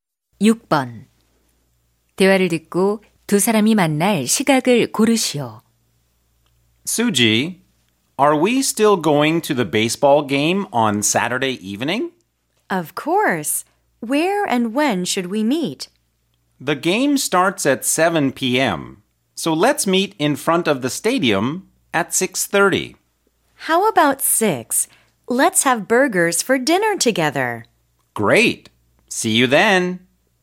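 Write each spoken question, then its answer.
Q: 대화를 듣고 두 사람이 만날 시각을 고르시오.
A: 6시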